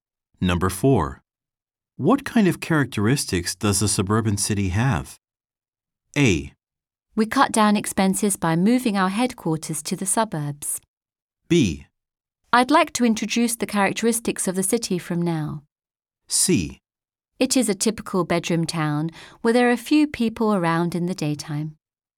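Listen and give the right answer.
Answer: C: It is a typical bedroom town where there are few people around in the daytime.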